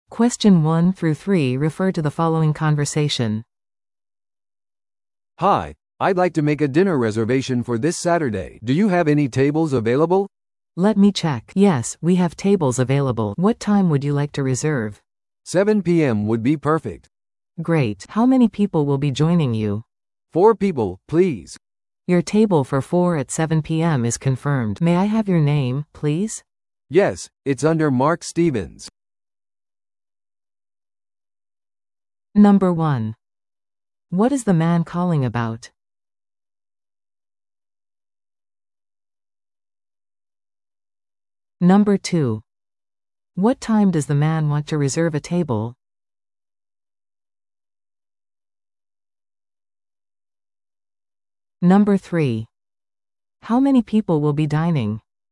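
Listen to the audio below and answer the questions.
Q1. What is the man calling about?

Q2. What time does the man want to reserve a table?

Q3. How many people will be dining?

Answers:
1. A dinner reservation for Saturday
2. 7 PM
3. Four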